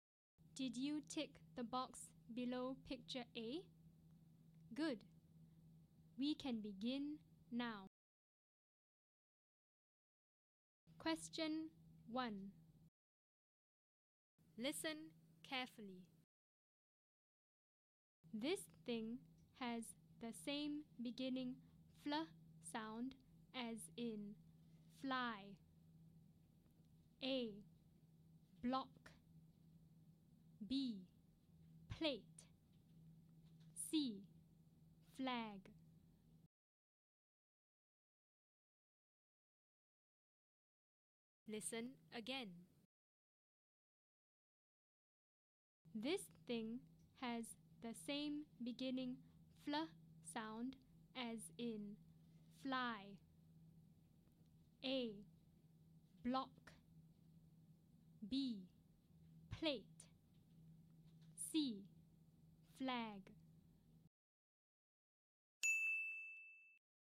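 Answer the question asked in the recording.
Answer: C: Flag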